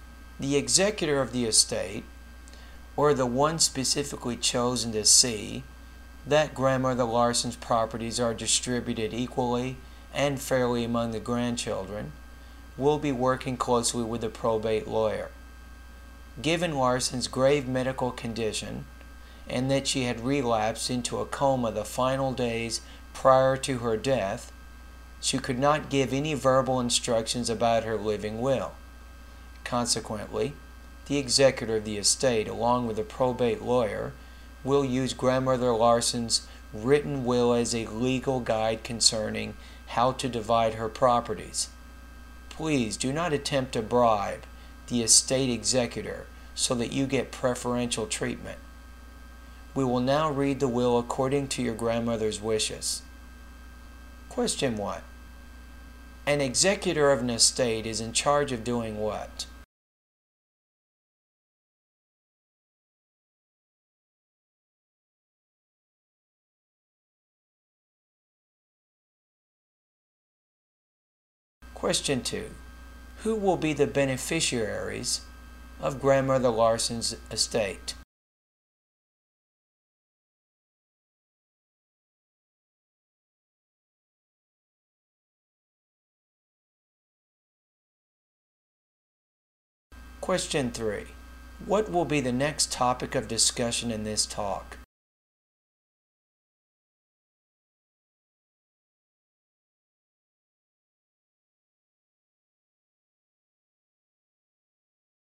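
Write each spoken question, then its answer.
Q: An executor of an estate is in charge of doing what?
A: Seeing that the deceased's properties are distributed equally and fairly

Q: Who will be the beneficiaries of Grandmother Larson's estate?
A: Her grandchildren

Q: What will be the next topic of discussion in this talk?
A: The reading of the grandmother's will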